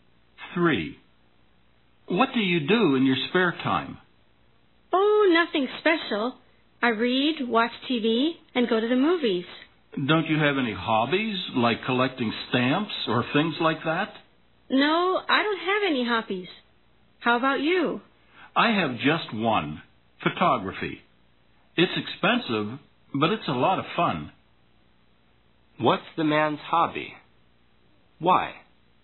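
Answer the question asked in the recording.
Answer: Photography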